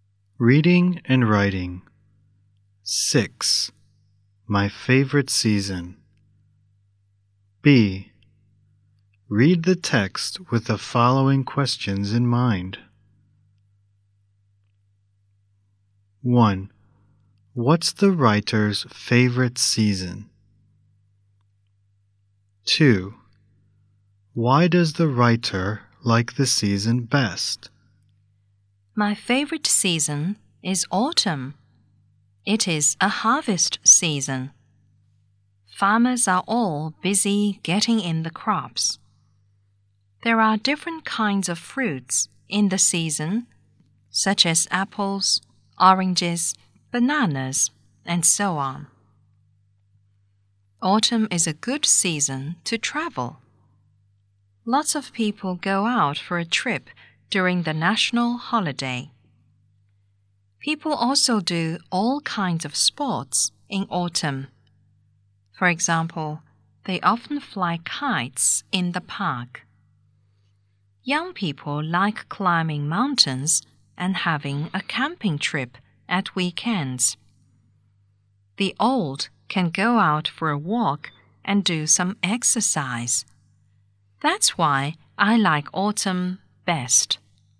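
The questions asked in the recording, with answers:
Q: What's the writer's favorite season?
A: Autumn

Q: Why does the writer like the season best?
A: It is a harvest season with many fruits, a good season to travel, and people can do all kinds of sports.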